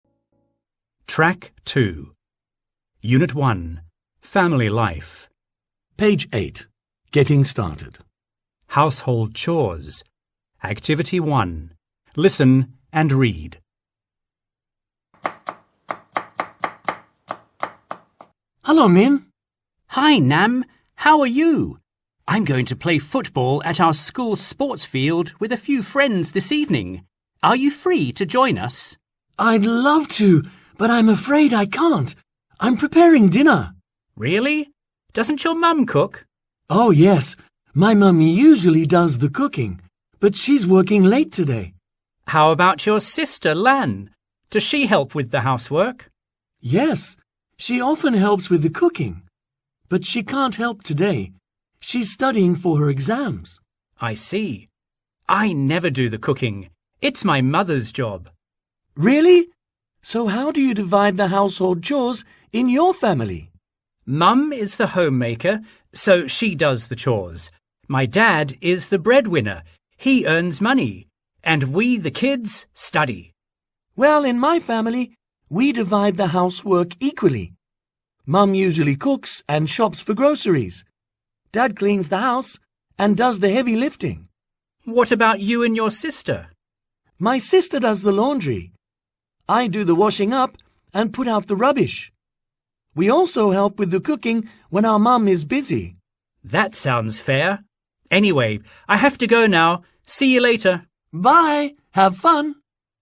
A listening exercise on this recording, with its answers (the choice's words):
Task: Choose the best answer (A, B, or C)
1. Why can't Nam play football this evening?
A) He has to study.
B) He's preparing dinner.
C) He's visiting friends.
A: He's preparing dinner.

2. Who usually cooks in Nam's family?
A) His mum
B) His dad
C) His sister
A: His mum

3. What does Nam's father do?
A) He does the laundry.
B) He cleans the house and does the heavy lifting.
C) He does the shopping.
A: He cleans the house and does the heavy lifting.

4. What does Nam do to help at home?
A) He cooks.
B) He washes up and puts out the rubbish.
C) He does the laundry.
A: He washes up and puts out the rubbish.

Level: lớp 10